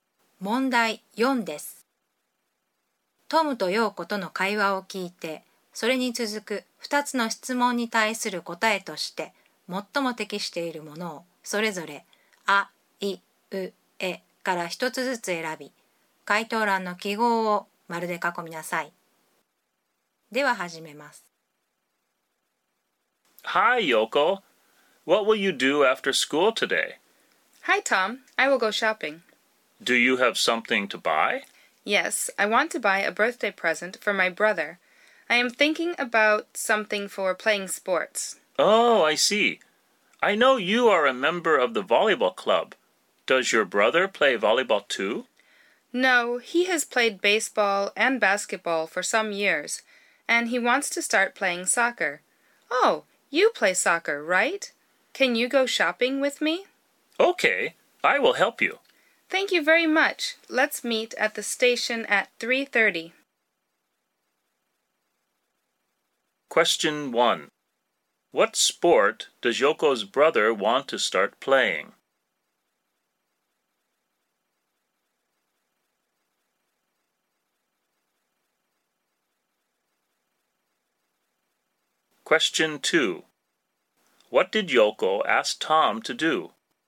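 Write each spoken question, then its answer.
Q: What sport does Yoko's brother want to start playing?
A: Soccer

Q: What did Yoko ask Tom to do?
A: To go shopping with her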